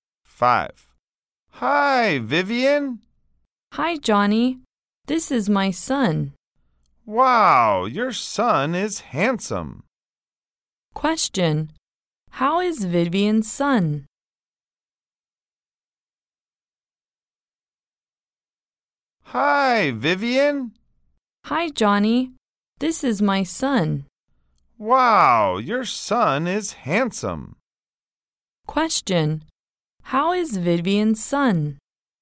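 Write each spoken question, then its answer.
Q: How is Vivian's son?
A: Handsome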